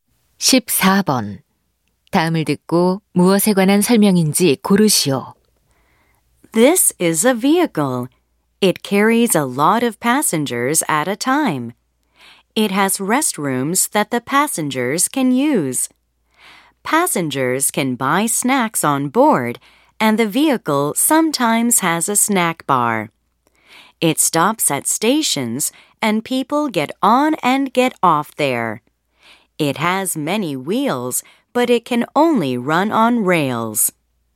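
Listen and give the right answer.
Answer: 기차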